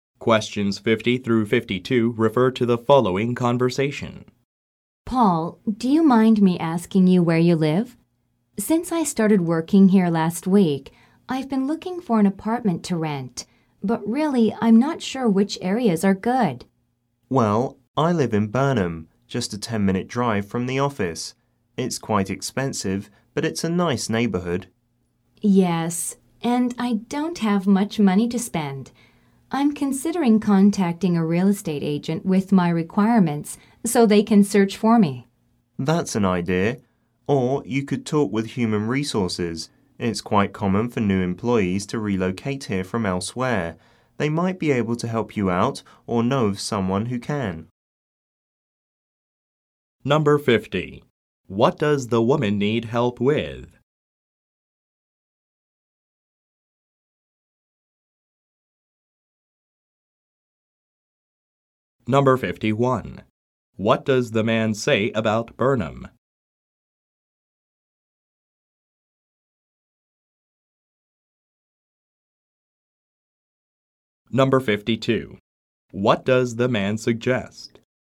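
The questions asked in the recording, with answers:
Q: What does the woman need help with?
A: Finding an apartment to rent

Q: What does the man say about Burnham?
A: It is expensive but a nice neighborhood, 10 minutes from the office

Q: What does the man suggest?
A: Talking with human resources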